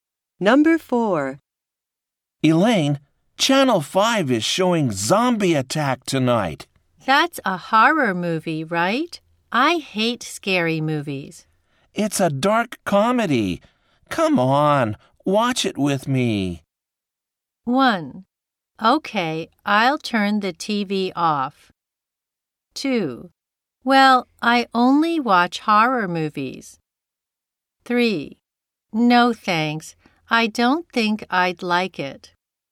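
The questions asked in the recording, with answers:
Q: It's a dark comedy. Come on, watch it with me.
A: 3: No thanks.I don't think I'd like it.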